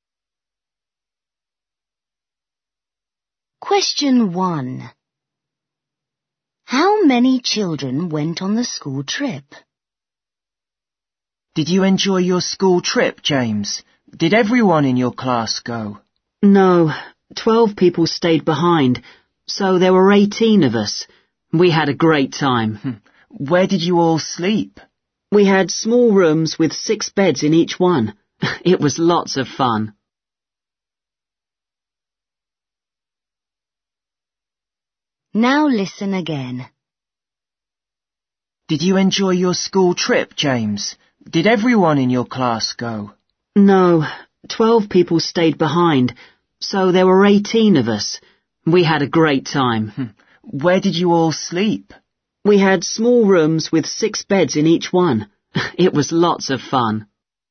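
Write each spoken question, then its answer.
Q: How many children went on the school trip?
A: 18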